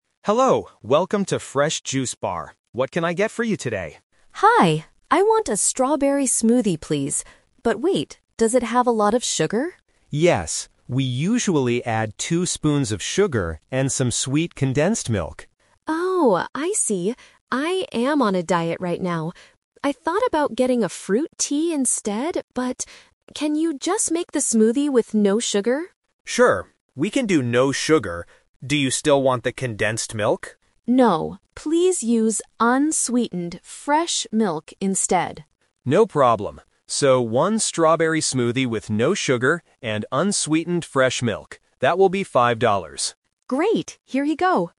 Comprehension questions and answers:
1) What does the customer finally decide to order?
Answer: A strawberry smoothie.

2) What does the customer want to change about the sugar?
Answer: She wants the drink without any sugar.

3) What kind of milk will the staff use for the drink?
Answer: Unsweetened fresh milk.

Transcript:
Staff: Hello, welcome to Fresh Juice Bar. What can I get for you today?
Customer: Hi. I want a strawberry smoothie, please. But wait, does it have a lot of sugar?
Staff: Yes, we usually add two spoons of sugar and some sweet condensed milk.
Customer: Oh, I see. I am on a diet right now. I thought about getting a fruit tea instead, but... can you just make the smoothie with no sugar?
Staff: Sure. We can do no sugar. Do you still want the condensed milk?
Customer: No, please use unsweetened fresh milk instead.
Staff: No problem. So, one strawberry smoothie with no sugar and unsweetened fresh milk. That will be 5 dollars.